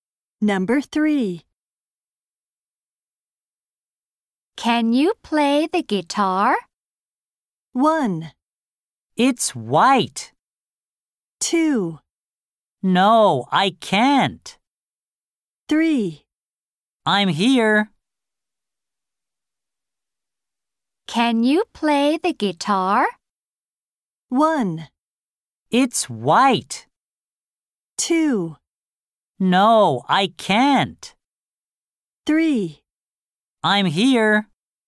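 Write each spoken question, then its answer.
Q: Can you play the guitar?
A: 2: No, I can't.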